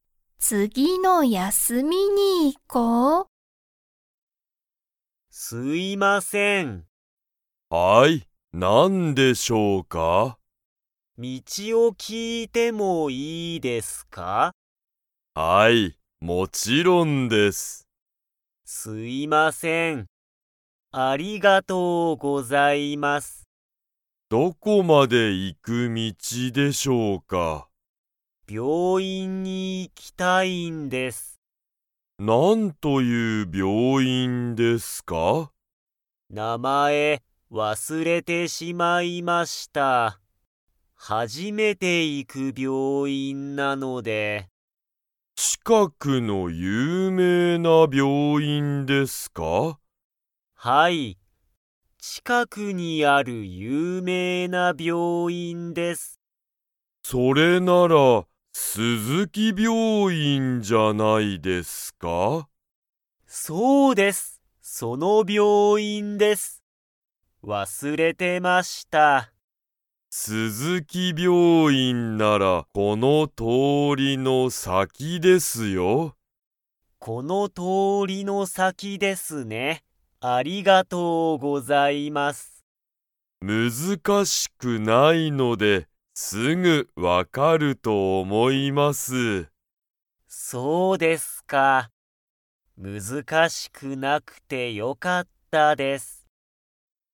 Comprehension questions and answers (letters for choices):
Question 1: 佐藤(さとう)さんは前(まえ)に、その病院(びょういん)に行(い)きましたか?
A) はい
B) いいえ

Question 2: スズキ病院(びょういん)は、____。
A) 難(むずか)しい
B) いっぱいだ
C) 有名(ゆうめい)だ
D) 大変(たいへん)だ)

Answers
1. B
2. C

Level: Level 2